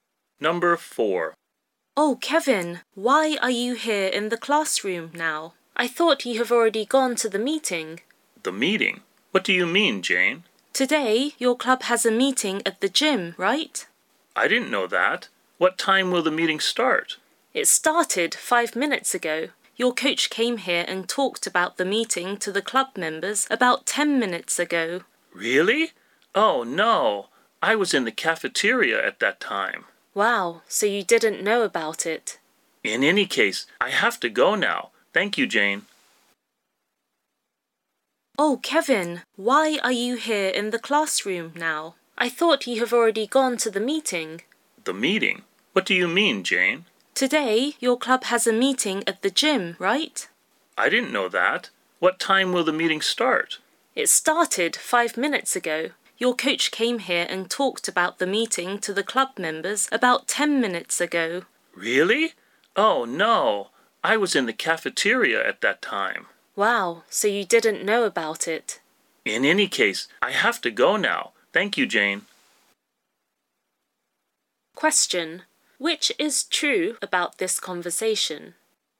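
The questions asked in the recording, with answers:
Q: Which is true about this conversation?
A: Kevin didn't know about the meeting because he was in the cafeteria when the coach told the club members.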